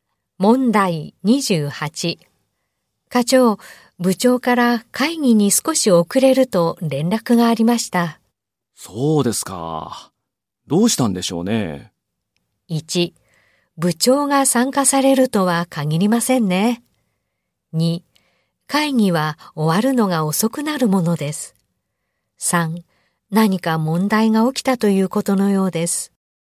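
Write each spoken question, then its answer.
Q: 課長、部長から会議に少し遅れると連絡がありました。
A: 3: 何か問題が起きたということのようです。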